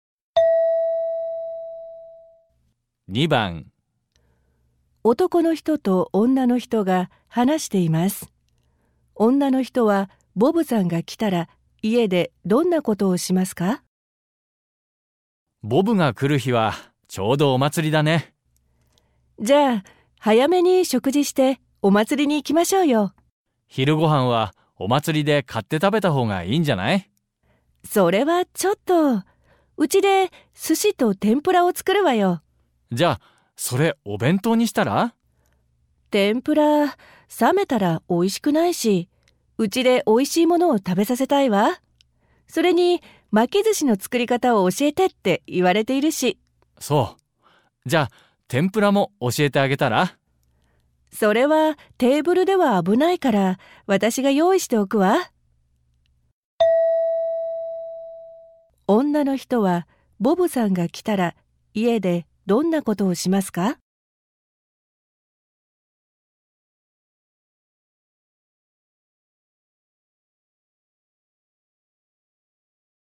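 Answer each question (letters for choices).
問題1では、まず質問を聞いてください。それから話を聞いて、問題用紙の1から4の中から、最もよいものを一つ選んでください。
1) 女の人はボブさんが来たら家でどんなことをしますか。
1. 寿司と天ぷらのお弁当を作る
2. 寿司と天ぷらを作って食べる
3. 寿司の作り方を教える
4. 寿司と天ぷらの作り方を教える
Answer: 3

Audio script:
F:天ぷら、冷めたらおいしくないし、うちでおいしい物を食べさせたいわ。それに巻き寿司の作り方を教えてって言われているし。
M:そう。じゃ、天ぷらも教えてあげたら?/Vậy thì dạy cả cách làm món Tempura luôn?
F:それはテーブルでは危ないから、私が用意しておくわ。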